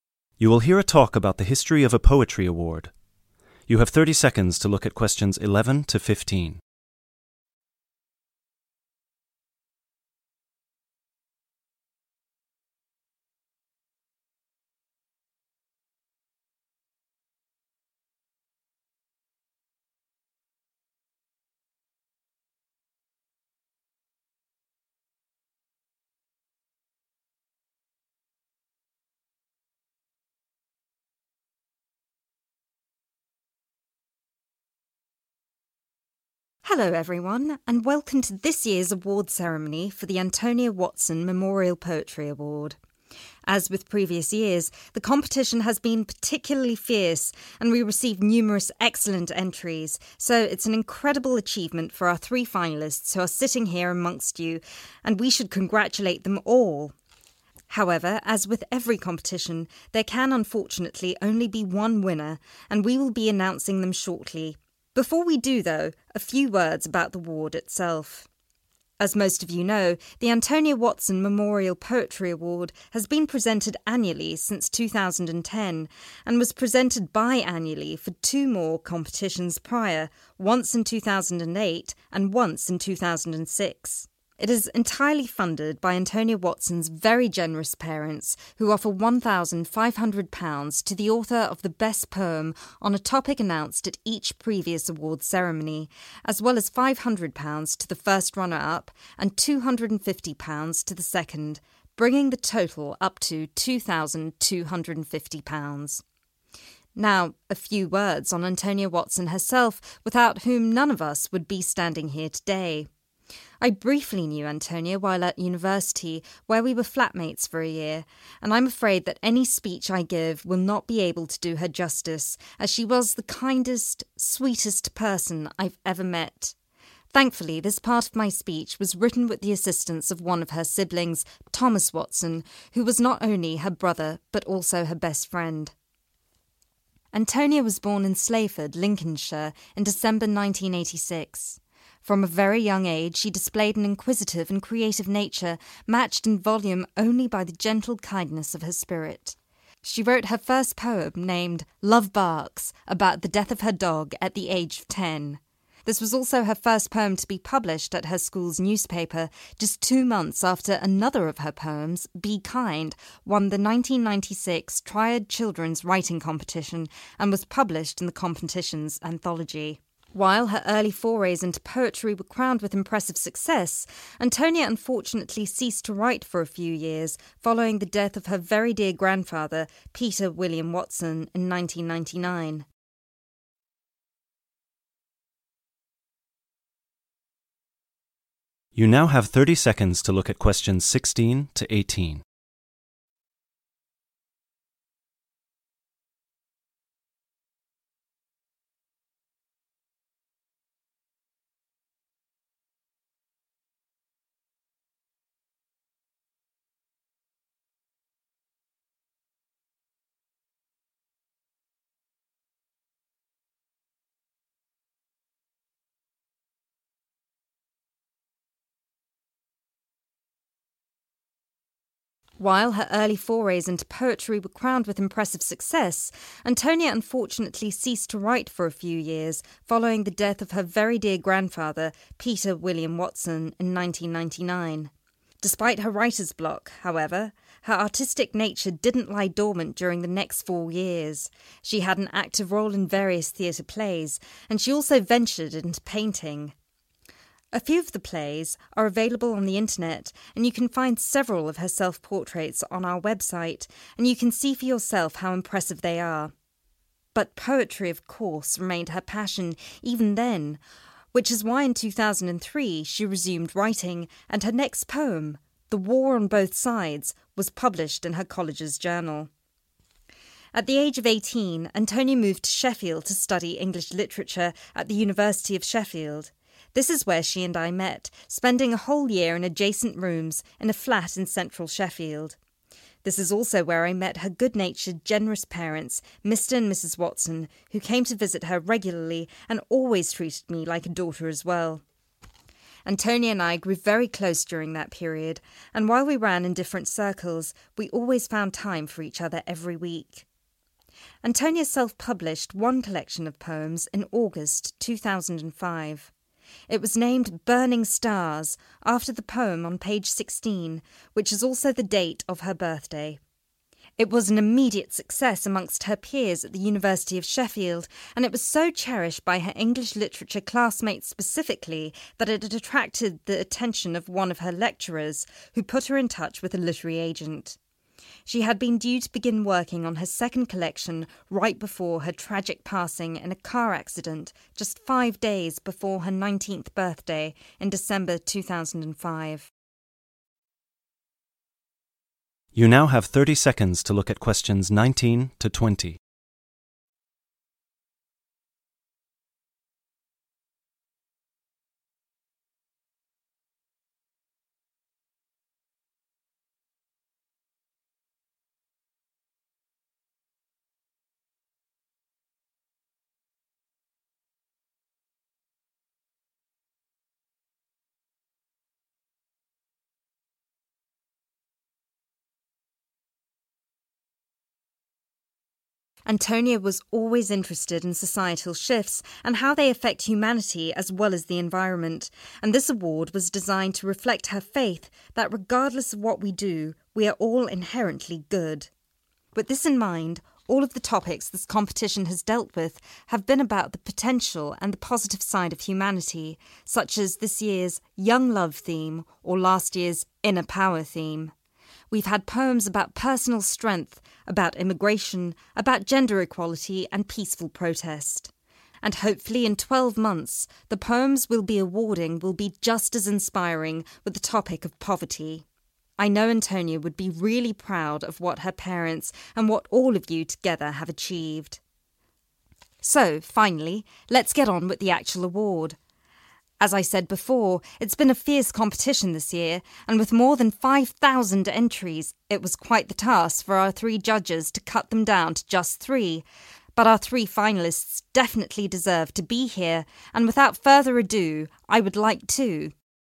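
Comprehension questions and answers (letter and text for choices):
Complete the sentences below. Write NO MORE THAN TWO WORDS AND/OR A NUMBER for each answer.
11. Antonia Watson's parents instituted the Antonia Watson Memorial Poetry Award in.................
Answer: 2006

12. The Antonia Watson Memorial Poetry Award's second prize is £ ................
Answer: 500

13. Thomas is one of Antonia Watson's....................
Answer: siblings

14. The name of the first poem Antonia Watson published was...................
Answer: Love Barks

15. After her grandfather passed away, Antonia suffered from...............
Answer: writer's block

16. Between 1999 and 2003, Antonia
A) wrote a few theatre plays and painted self-portraits.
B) published several poems in her college's journal.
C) remained ardent about poetry despite her break from writing.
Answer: C) remained ardent about poetry despite her break from writing.

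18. Antonia's self-published poem collection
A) was named after a poem about her birthday.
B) was released a few months before her death in 2005.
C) led to her signing a contract with a literary agent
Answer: B) was released a few months before her death in 2005.

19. reflecting Antonia's personal belief that all humans are 19............... .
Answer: inherently good

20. Next year's competition is no exception, with its theme of 20.............. .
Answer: poverty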